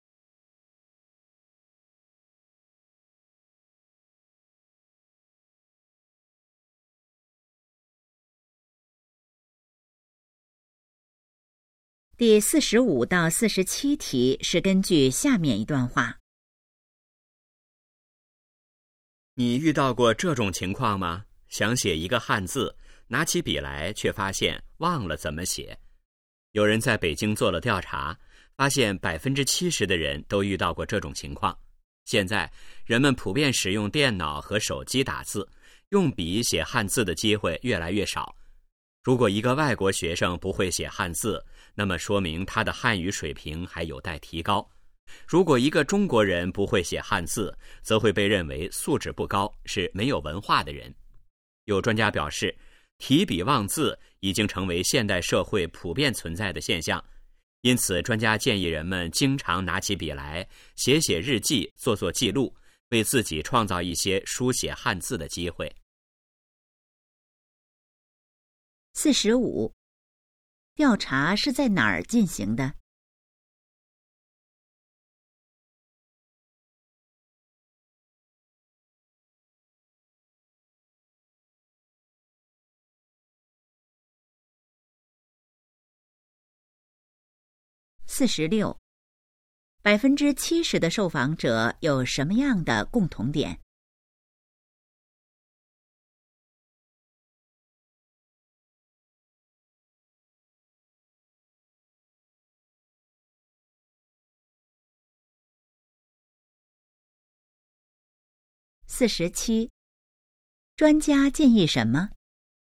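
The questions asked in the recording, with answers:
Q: 调查是在哪儿进行的?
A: 北京

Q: 70%的受访者有什么样的共同点?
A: 提笔忘字

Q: 专家建议什么?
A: 经常写日记、做记录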